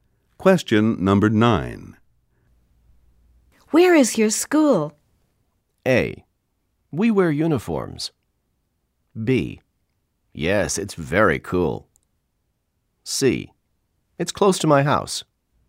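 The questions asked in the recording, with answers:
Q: Where is your school?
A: C: It's close to my house.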